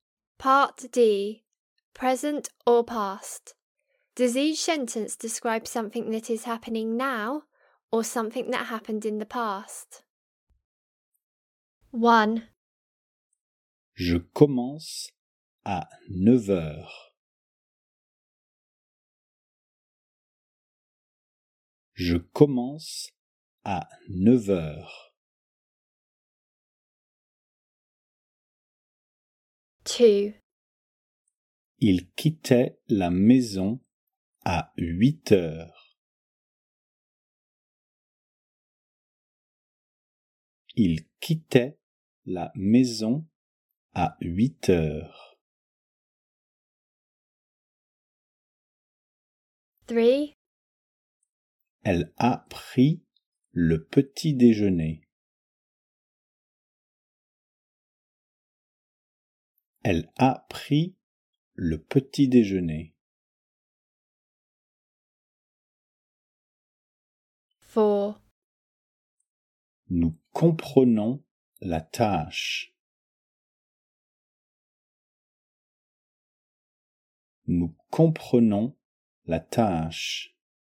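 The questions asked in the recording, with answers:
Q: Je commence à 9 heures.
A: happening now (present)

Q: Il quittait la maison à 8 heures.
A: happened in the past

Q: Elle a pris le petit déjeuner.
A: happened in the past

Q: Nous comprenons la tâche.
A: happening now (present)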